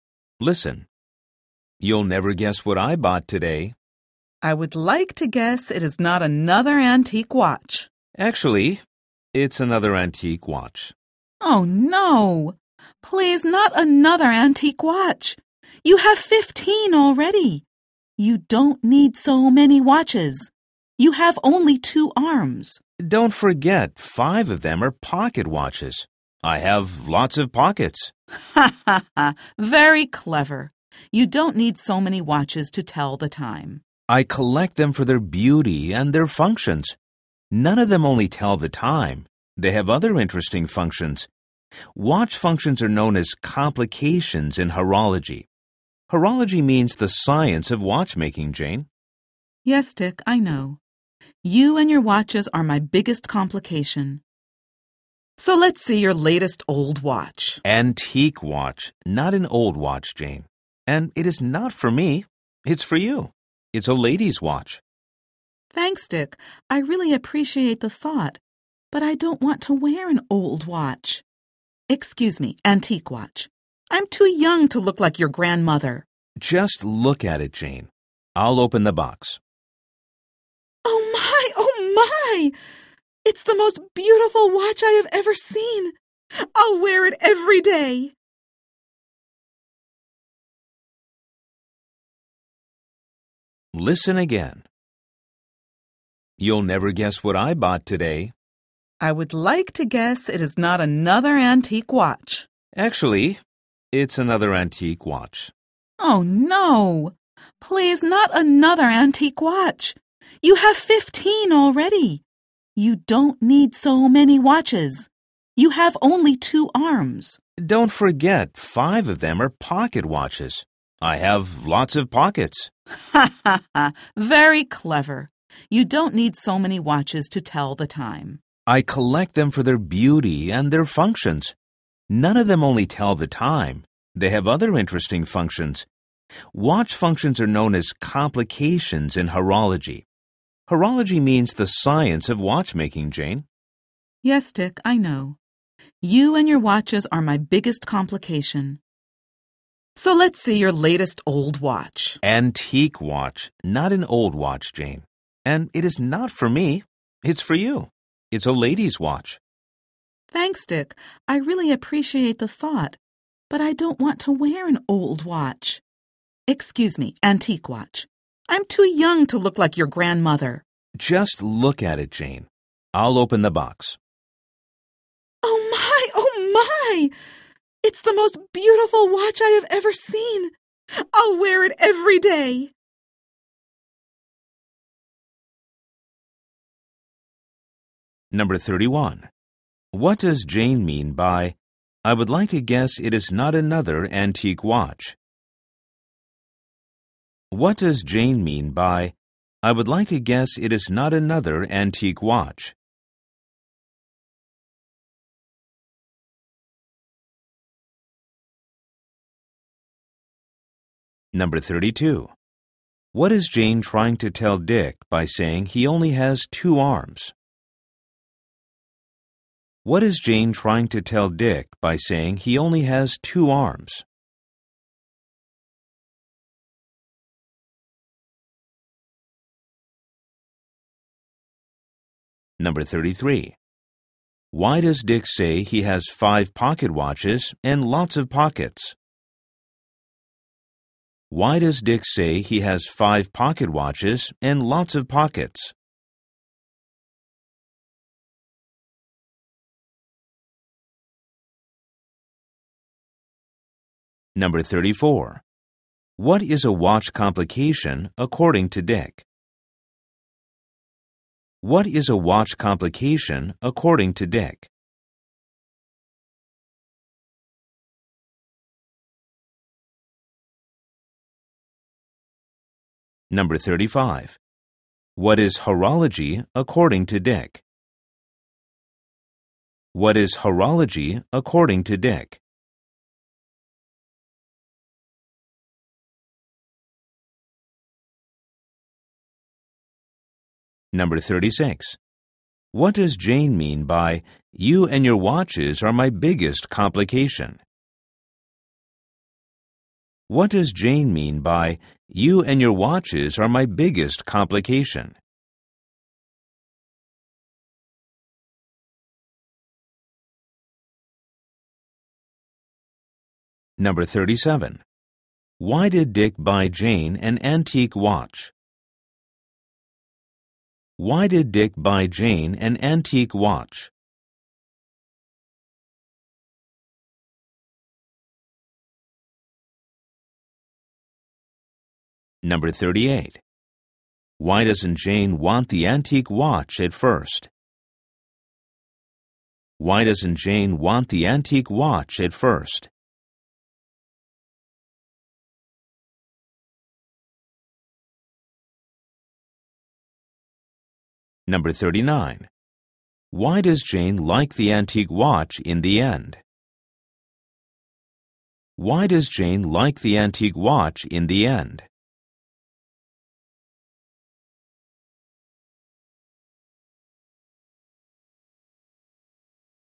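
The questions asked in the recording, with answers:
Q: What does Jane mean by, I would like to guess it is not another antique watch?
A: She hopes he didn't buy another antique watch

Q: What is Jane trying to tell Dick by saying he only has two arms?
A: He doesn't need so many watches

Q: What is a watch complication according to Dick?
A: A watch function

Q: What is horology according to Dick?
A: The science of watchmaking

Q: Why doesn't Jane want the antique watch at first?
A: She thinks she's too young and it would make her look like his grandmother

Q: Why does Jane like the antique watch in the end?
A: It's the most beautiful watch she has ever seen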